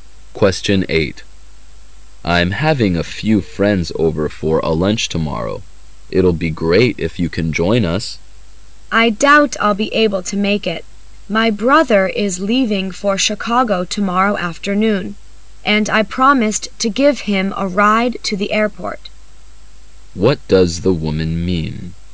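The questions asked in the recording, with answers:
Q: What does the woman mean?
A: She probably can't come to the lunch because she's driving her brother to the airport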